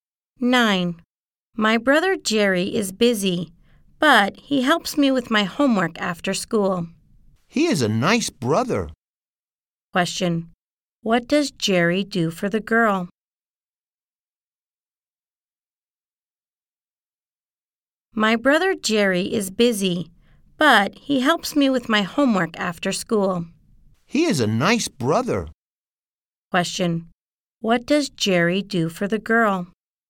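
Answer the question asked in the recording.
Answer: He helps her with her homework.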